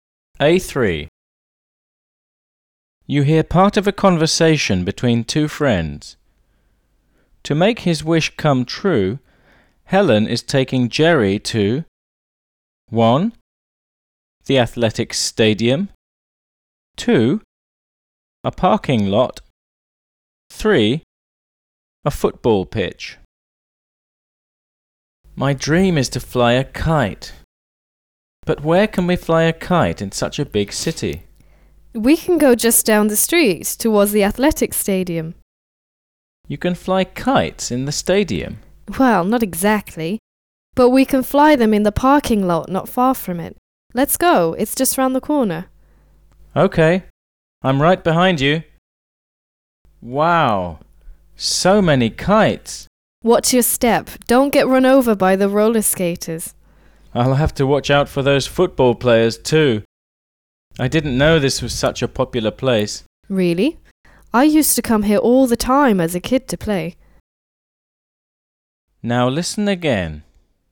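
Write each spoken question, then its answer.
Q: To make his wish come true, Helen is taking Jerry to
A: 2: A parking lot.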